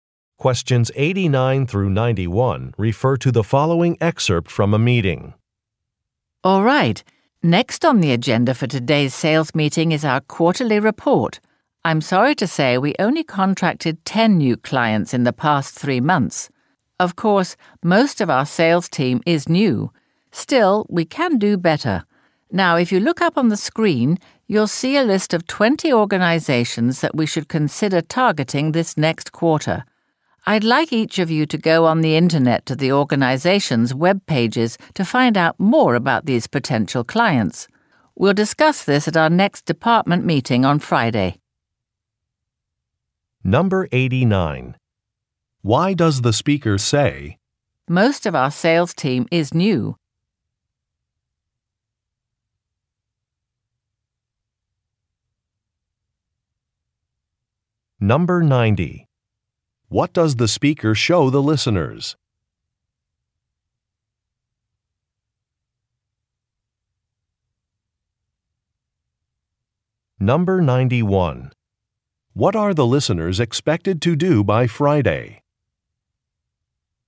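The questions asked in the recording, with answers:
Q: Why does the speaker say, "Most of our sales team is new"?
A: To explain why few new clients were contracted

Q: What does the speaker show the listeners?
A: A list of 20 organizations to target

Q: What are the listeners expected to do by Friday?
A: Research the potential clients on their web pages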